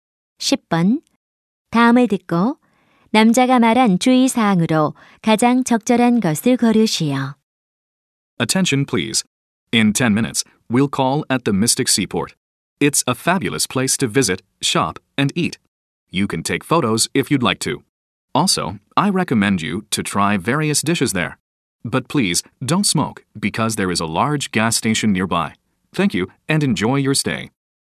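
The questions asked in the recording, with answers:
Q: 다음을 듣고 남자가 말한 주의 사항으로 가장 적절한 것을 고르시오.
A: 흡연 금지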